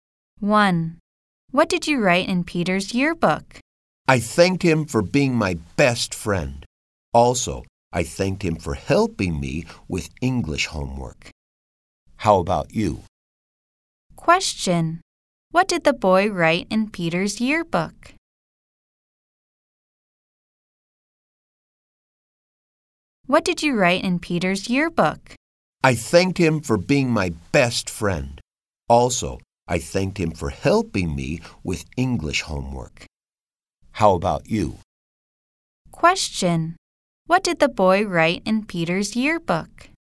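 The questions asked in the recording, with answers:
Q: Question, what did the boy write in Peter's yearbook?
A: He thanked Peter for being his best friend and for helping him with his English homework.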